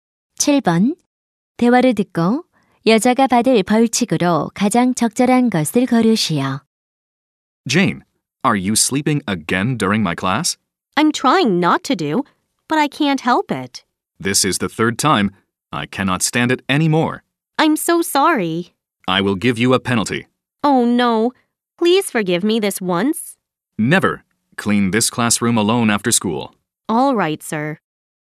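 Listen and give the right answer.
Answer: 방과 후 혼자 교실 청소하기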